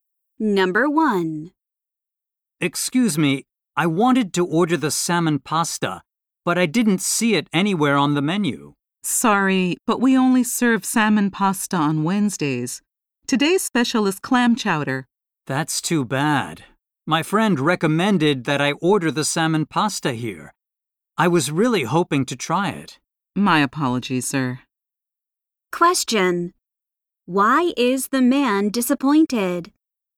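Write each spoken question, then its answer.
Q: Why is the man disappointed?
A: Salmon pasta is only served on Wednesdays, so he can't try it today.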